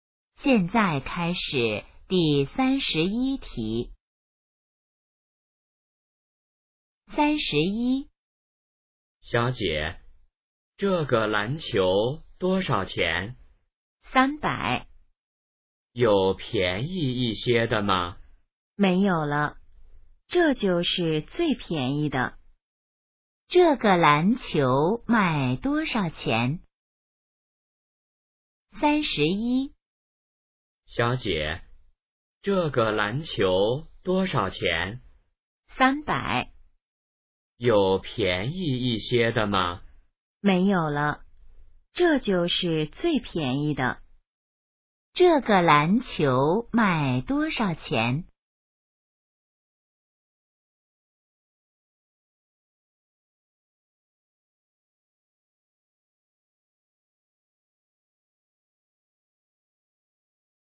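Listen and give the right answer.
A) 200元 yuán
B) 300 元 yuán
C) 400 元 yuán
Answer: B) 300 元 yuán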